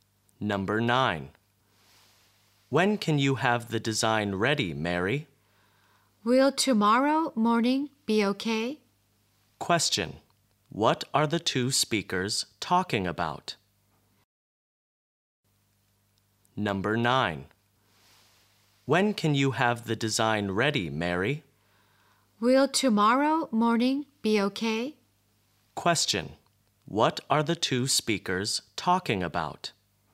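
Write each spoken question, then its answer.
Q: What are the two speakers talking about?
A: When the design will be ready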